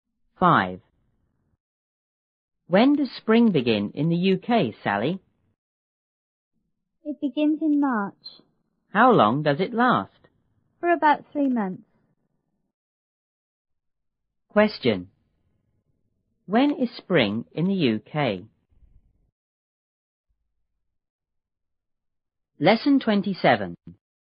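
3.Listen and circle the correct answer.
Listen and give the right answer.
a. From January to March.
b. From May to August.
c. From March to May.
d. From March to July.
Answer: c. From March to May.

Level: 六年级下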